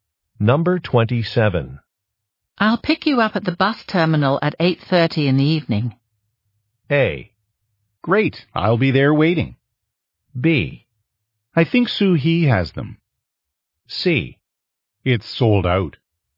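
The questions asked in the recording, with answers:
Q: I'll pick you up at the bus terminal at 8:30 in the evening.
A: A: Great, I'll be there waiting.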